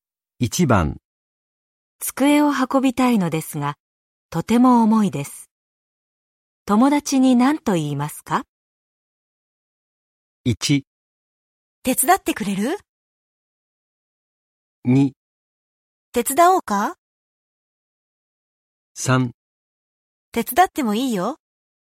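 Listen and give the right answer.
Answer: 1: 手伝ってくれる?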